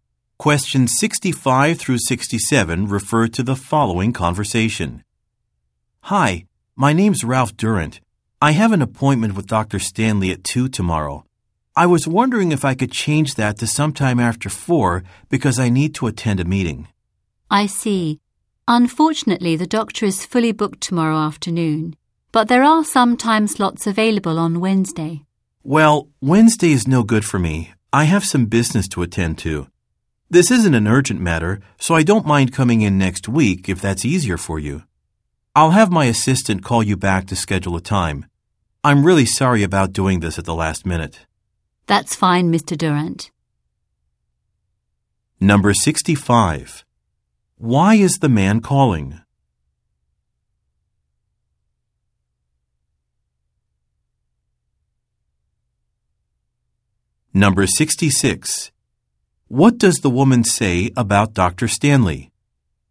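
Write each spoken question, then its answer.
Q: Why is the man calling?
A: To change his appointment time to after 4 because he has a meeting

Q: What does the woman say about Dr. Stanley?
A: He is fully booked tomorrow afternoon

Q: What does the man say he will do?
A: Have his assistant call back to schedule a time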